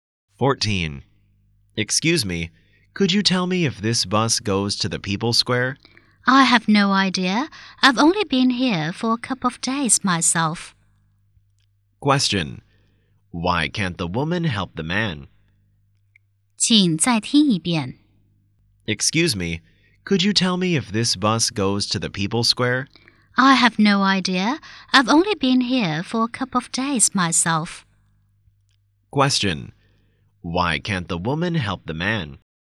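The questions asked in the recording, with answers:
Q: Question: Why can't the woman help the man?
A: She is new here; she has only been there a couple of days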